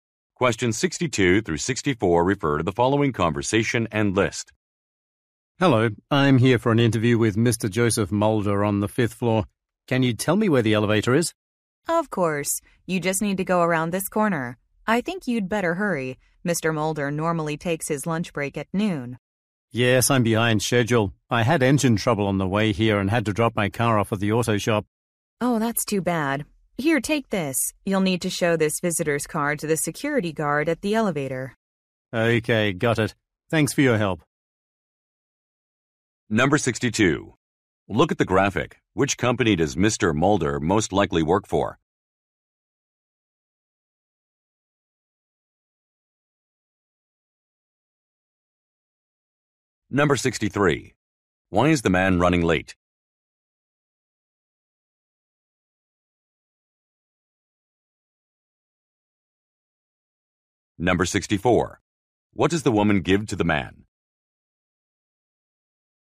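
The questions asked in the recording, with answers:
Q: Why is the man running late?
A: He had engine trouble with his car

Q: What does the woman give to the man?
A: A visitor's card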